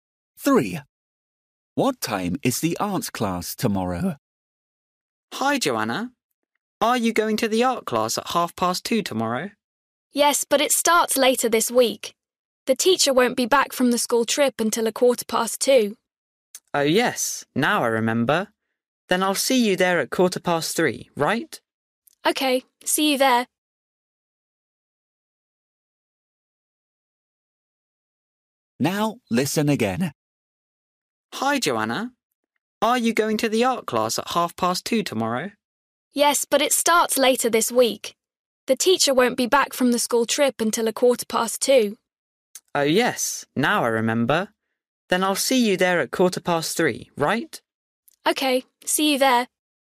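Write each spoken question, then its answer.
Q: What time is the art class tomorrow?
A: 3:15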